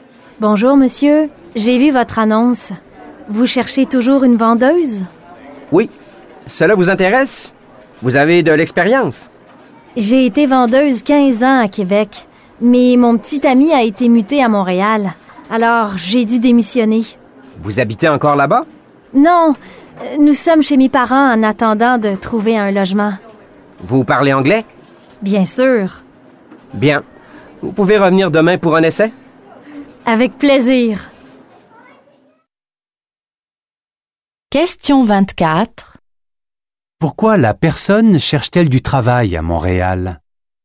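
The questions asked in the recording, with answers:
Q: Pourquoi la personne cherche-t-elle du travail à Montréal?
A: Son petit ami a été muté à Montréal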